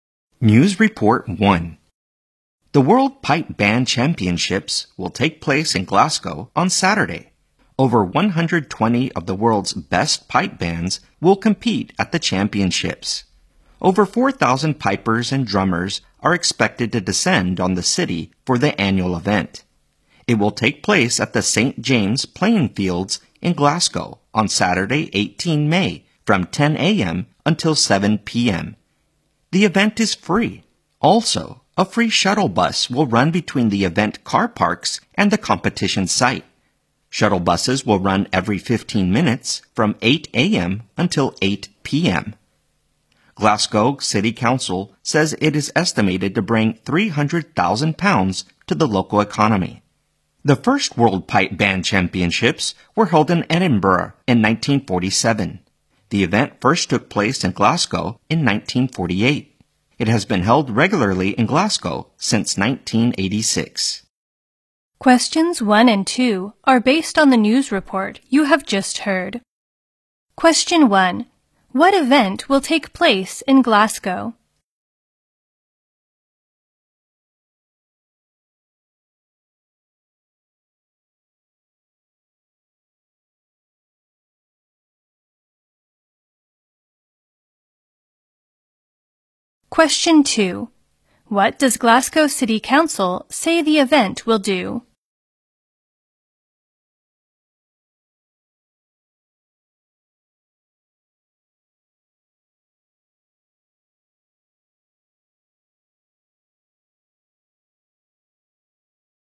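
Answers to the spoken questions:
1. The World Pipe Band Championships
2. Bring £300,000 to the local economy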